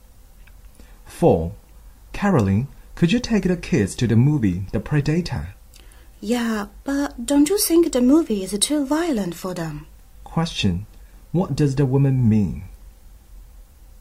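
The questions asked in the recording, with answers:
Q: What does the woman mean?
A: The movie may not be suitable for the kids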